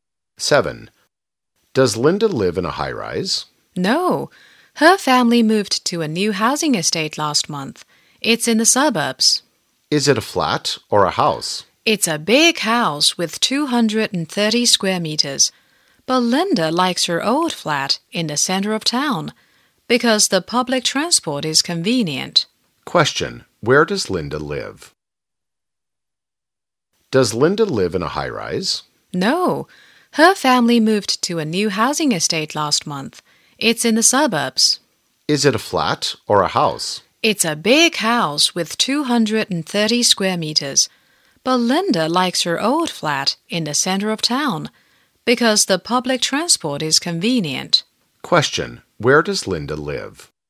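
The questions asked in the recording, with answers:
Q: Where does Linda live?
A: In a big house in a new housing estate in the suburbs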